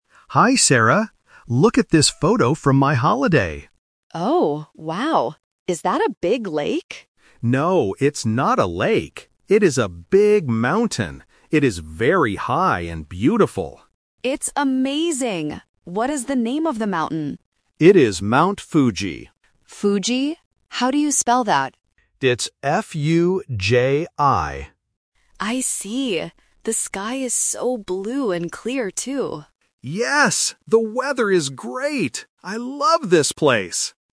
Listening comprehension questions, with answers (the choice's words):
Listen to the conversation and choose the correct answer (A, B, or C).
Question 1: What is in the photo?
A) A big lake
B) A big mountain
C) A big forest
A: A big mountain

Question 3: What is the color of the sky in the photo?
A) Blue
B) White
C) Grey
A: Blue

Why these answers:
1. The woman asks if it is a "lake", but the man corrects her: "No, it's not a lake. It is a big mountain."
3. The woman mentions: "The sky is so blue and clear". Options (B) and (C) are plausible for sky colors but are not mentioned in the script.

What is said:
Man: Hi, Sarah! Look at this photo from my holiday.
Woman: Oh, wow! Is that a big lake?
Man: No, it's not a lake. It is a big mountain. It is very high and beautiful.
Woman: It's amazing! What is the name of the mountain?
Man: It is Mount Fuji.
Woman: Fuji? How do you spell that?
Woman: I see. The sky is so blue and clear, too!

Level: A1